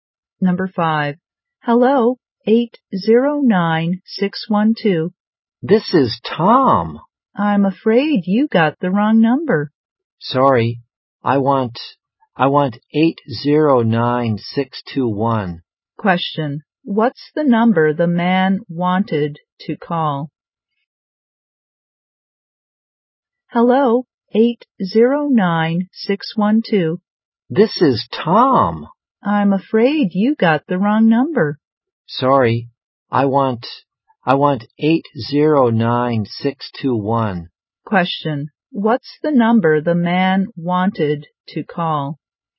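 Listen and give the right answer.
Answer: 809621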